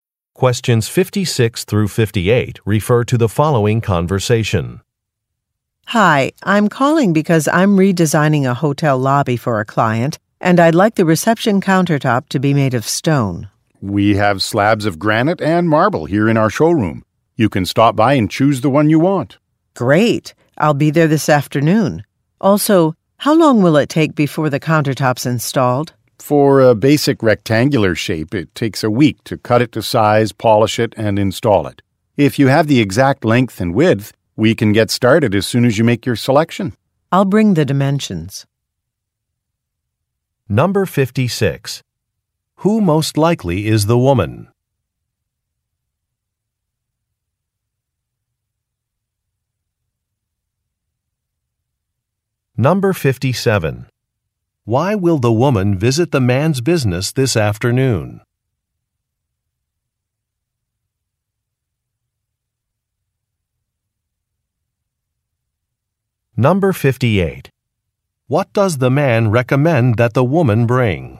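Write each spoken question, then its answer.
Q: Who most likely is the woman?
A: An interior designer

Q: Why will the woman visit the man's business this afternoon?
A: To choose a stone slab for the countertop

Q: What does the man recommend that the woman bring?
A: The exact dimensions (length and width)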